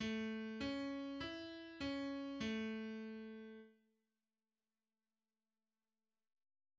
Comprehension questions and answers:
Entscheide zuerst nur: Dur oder Moll?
Dur oder Moll?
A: A-Dur